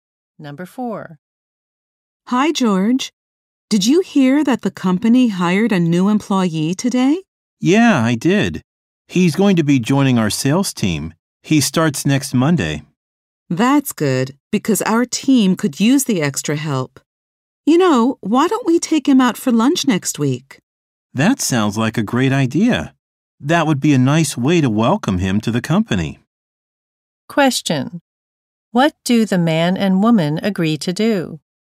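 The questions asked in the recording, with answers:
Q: What do the man and woman agree to do?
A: Take the new employee out for lunch next week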